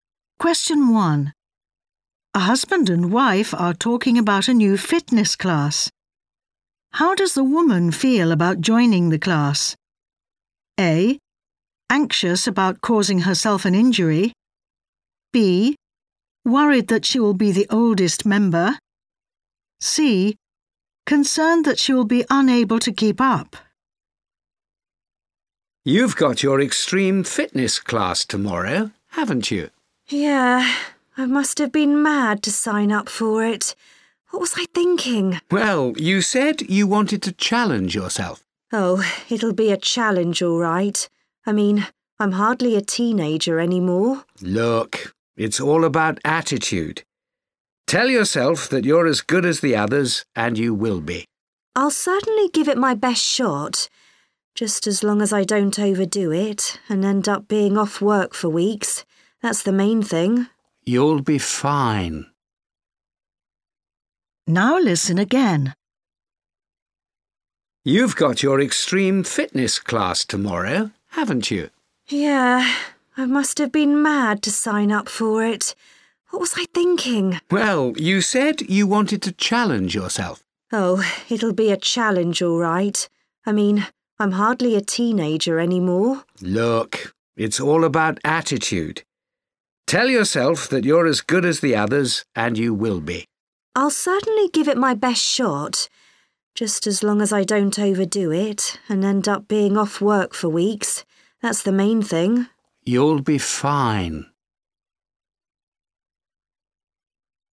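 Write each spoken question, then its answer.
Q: How does the woman feel about joining the class?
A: A: Anxious about causing herself an injury.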